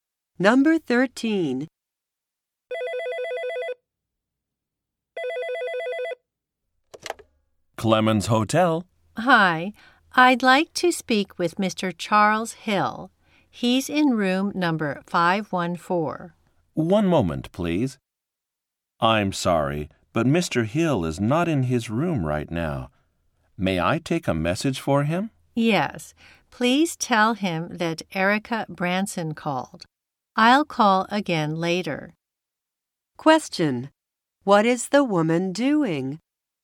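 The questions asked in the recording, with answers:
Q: What is the woman doing?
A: Calling to speak with a hotel guest (Mr. Charles Hill).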